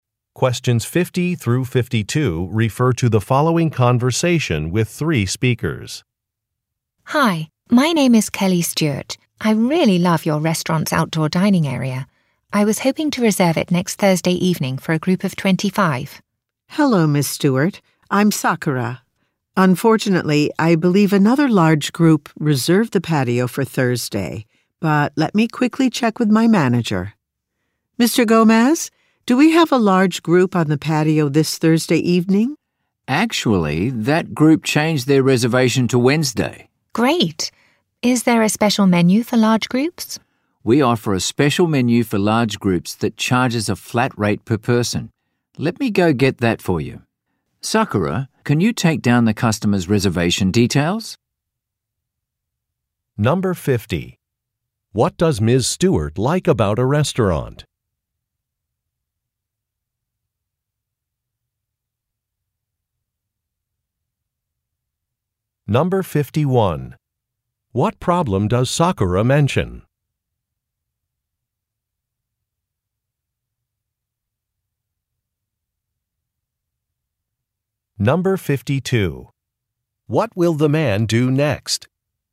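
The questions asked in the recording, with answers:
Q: What does Ms. Stewart like about a restaurant?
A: Its outdoor dining area

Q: What problem does Sakura mention?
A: She believes another large group reserved the patio for Thursday

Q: What will the man do next?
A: Get the special menu for large groups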